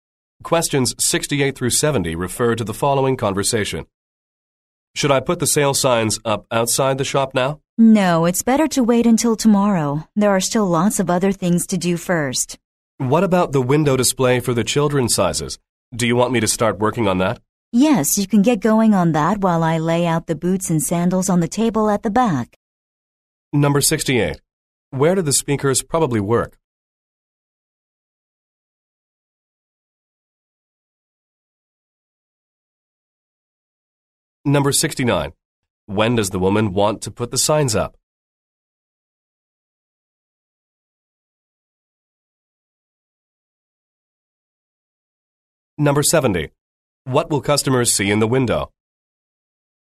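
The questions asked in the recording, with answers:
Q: When does the woman want to put the signs up?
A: Tomorrow

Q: What will customers see in the window?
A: A display of children's sizes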